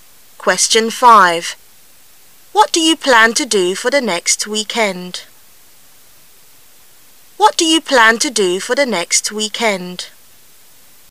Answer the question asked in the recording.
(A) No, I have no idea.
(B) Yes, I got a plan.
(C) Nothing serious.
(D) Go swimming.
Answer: (D) Go swimming.

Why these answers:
what do you plan to do?是在询问对方具体计划,因此回答时应说明计划,故只有选项[D]Go swimming符合本题语境。

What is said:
[解析] What do you plan to do for the next weekend?